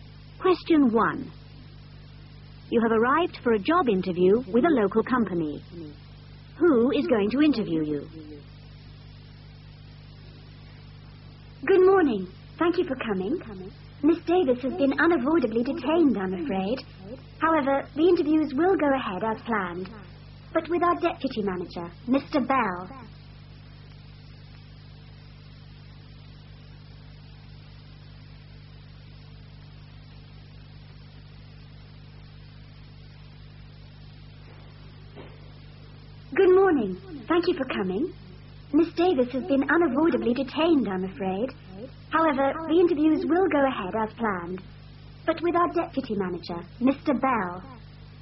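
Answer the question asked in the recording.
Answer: Mr. Bell, the deputy manager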